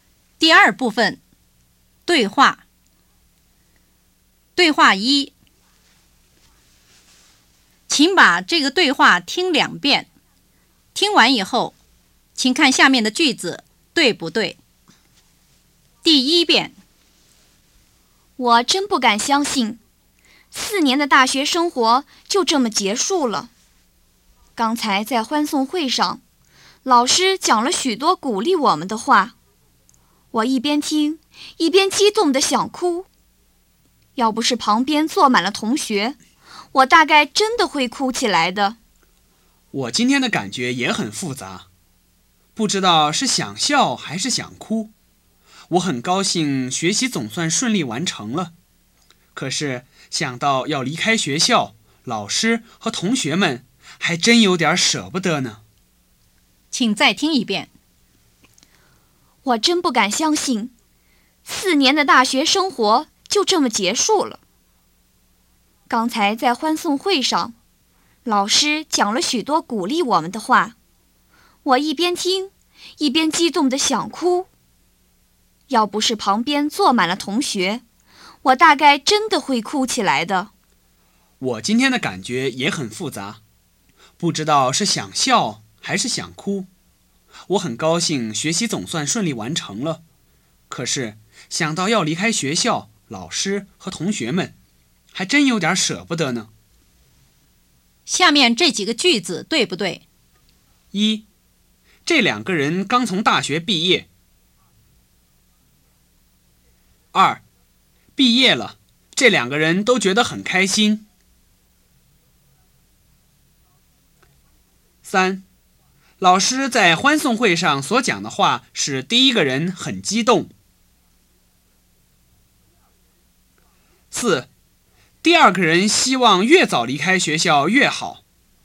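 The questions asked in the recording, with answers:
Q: 毕业了,这两个人都觉得很开心。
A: 不对

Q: 第二个人希望越早离开学校越好。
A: 不对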